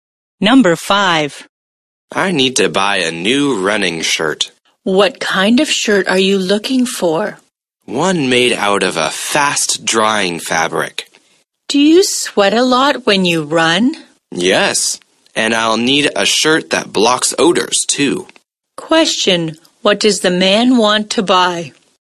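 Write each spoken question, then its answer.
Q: what does the man want to buy?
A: A fast-drying running shirt that blocks odors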